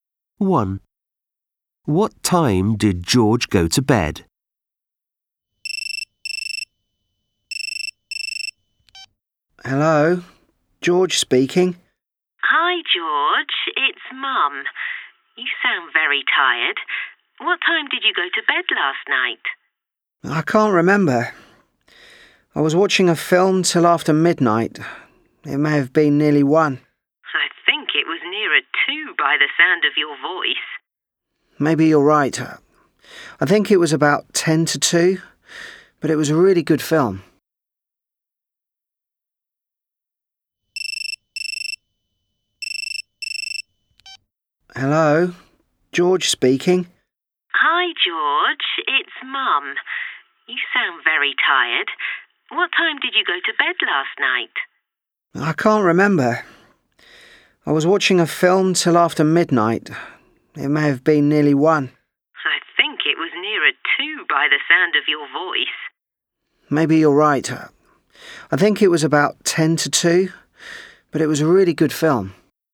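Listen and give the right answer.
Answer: About ten to two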